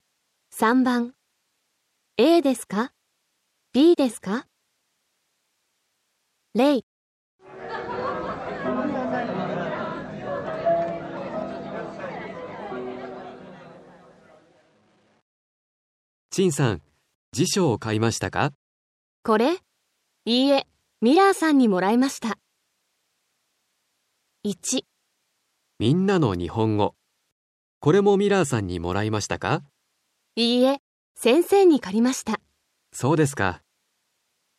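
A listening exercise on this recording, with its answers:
3. aですか、bですか。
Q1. 先生は チャンさんに 本を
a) 借りました。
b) 貸しました。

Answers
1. b

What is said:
A: チンさん、 辞書を 買いましたか。
B: これ? いいえ、 ミラーさんに もらいました。
A: 「みんなの日本語」。これも ミラーさんに もらいましたか。
B: いいえ、 先生に 借りました。
A: そうですか。

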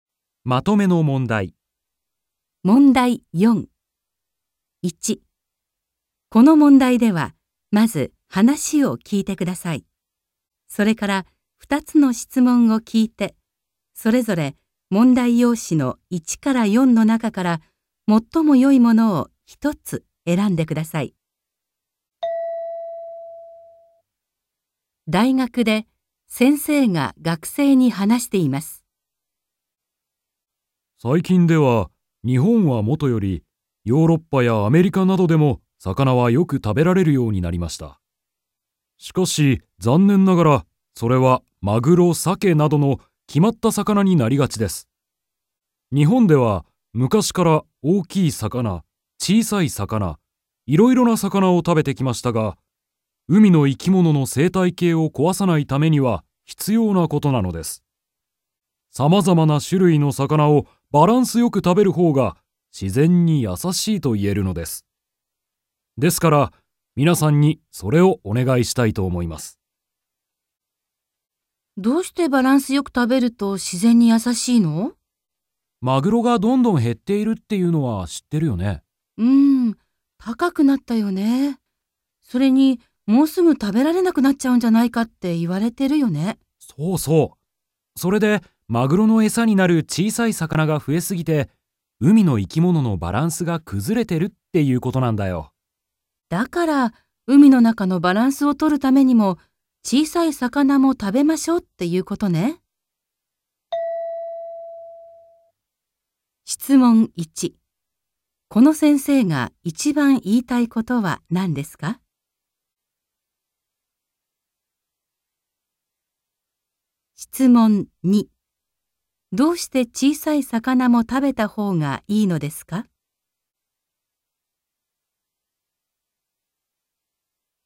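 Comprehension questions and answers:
1.この問題では、まず話を聞いてください。 それから二つの質問を聞いて、それぞれ問題用紙の1から4の中から、最もよいものを一つ選んでください。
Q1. この先生が一番言いたいことは何ですか。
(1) 日本以外の国でも魚がよく食べられていること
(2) マグロやサケなどは人気があること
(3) 日本人が昔から様々な魚を食べてきたこと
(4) いろいろな種類の魚を食べるべきだということ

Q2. どうして小さい魚も食べたほうがいいのですか。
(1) マグロの値段が上がっているため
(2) マグロの数が減っているため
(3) 海の生き物のバランスを取るため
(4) 小さい魚がえさになるためなるため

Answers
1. 4
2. 3

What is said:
大学で先生が学生に話しています。
M1: 最近では、日本はもとより、ヨーロッパやアメリカなどでも魚はよく食べられるようになりました。しかし、残念ながら、それはマグロ、サケなどの決まった魚になりがちです。日本では昔から大きい魚、小さい魚、いろいろな魚を食べてきましたが、海の生き物の生態系を壊さないためには必要なことなのです。
バランスよく食べるほうが自然に優しいと言えるのです。ですから、
皆さんにそれをお願いしたいと思います。
M2: マグロがどんどん減っているっていうのは知ってるよね。
F: うん。高くなったよね。それに、もうすぐ食べられなく
なっちゃうんじゃないかって言われてるよね。
M2: そうそう。それでマグロのえさになる小さい魚が増えすぎて、
F: だから、海の中のバランスを取るためにも小さい魚も食べ
ましょうっていうことね。

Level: N2

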